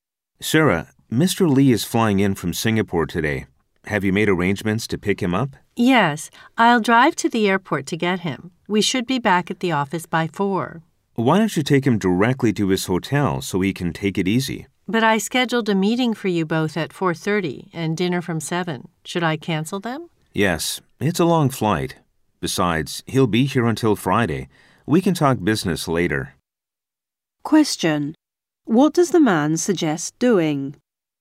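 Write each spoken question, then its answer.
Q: What does the man suggest doing?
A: Taking Mr. Lee directly to his hotel so he can rest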